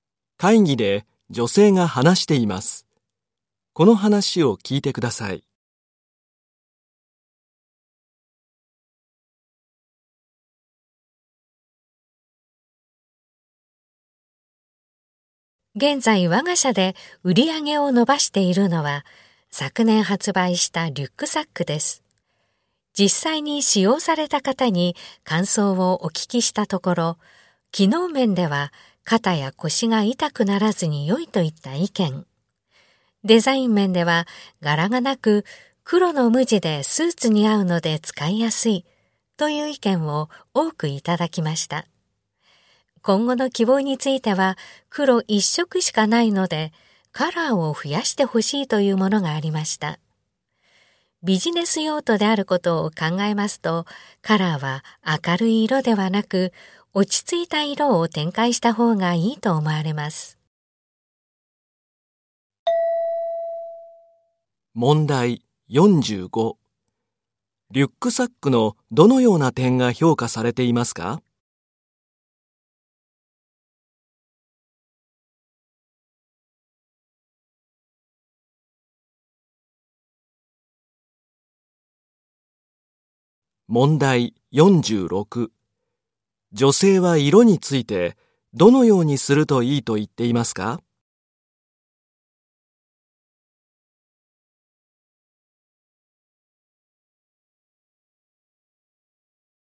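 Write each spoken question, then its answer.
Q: リュックサックのどのような点が評価されていますか?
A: 肩や腰が痛くならず、黒の無地でスーツに合う点

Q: 女性は色についてどのようにするといいと言っていますか?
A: 落ち着いた色を増やす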